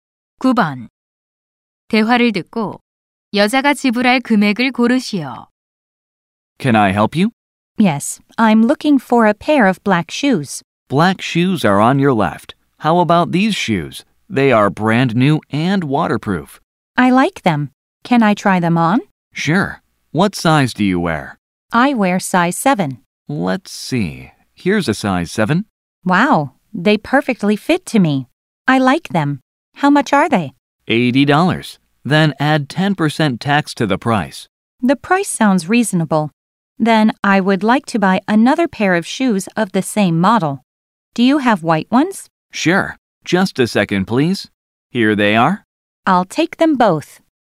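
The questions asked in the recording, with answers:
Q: 대화를 듣고 여자가 지불할 금액을 고르시오.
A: $176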